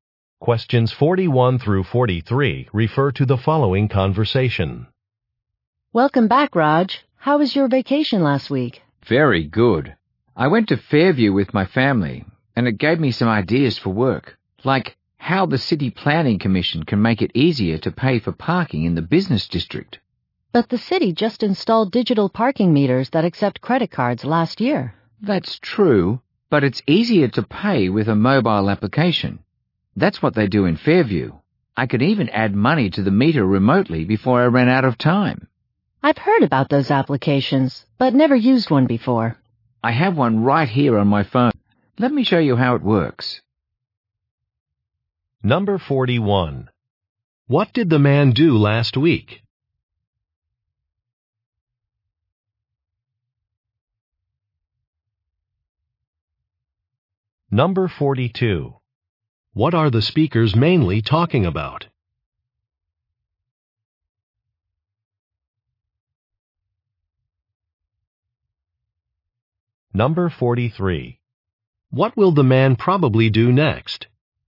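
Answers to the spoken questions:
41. He went on vacation to Fairview
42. Paying for parking with a mobile application
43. Show how the parking app works on his phone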